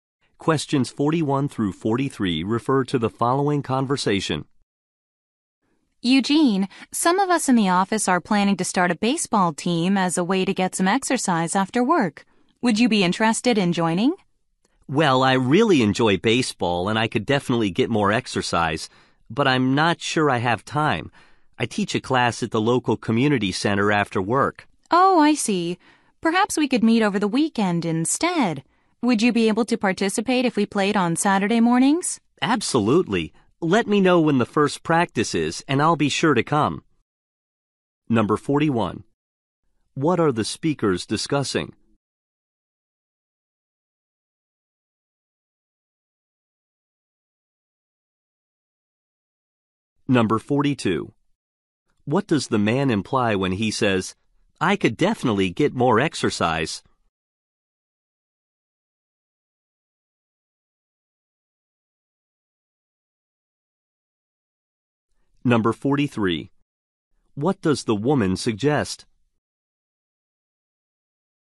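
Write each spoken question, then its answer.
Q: What are the speakers discussing?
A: Joining an office baseball team

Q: What does the man imply when he says, "I could definitely get more exercise"?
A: He is interested in joining

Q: What does the woman suggest?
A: Playing on Saturday mornings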